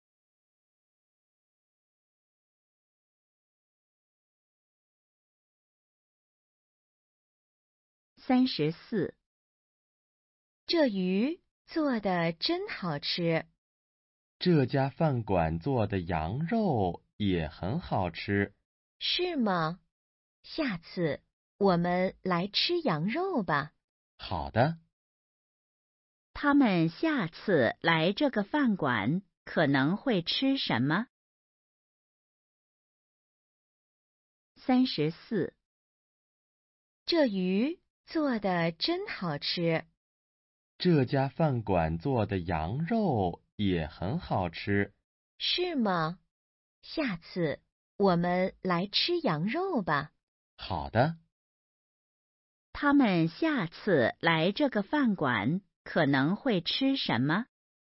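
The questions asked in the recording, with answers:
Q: 他们下次来这个饭馆可能会吃什么?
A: 羊肉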